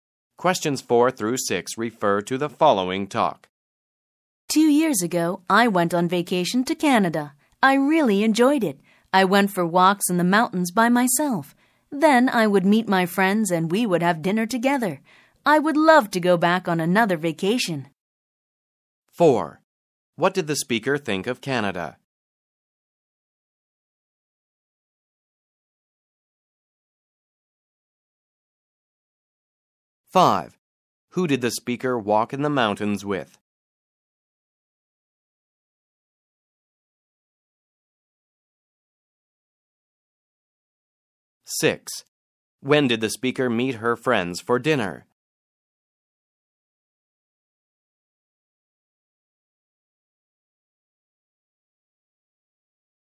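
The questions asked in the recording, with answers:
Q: What did the speaker think of Canada?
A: She really enjoyed it

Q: Who did the speaker walk in the mountains with?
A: Nobody; she walked by herself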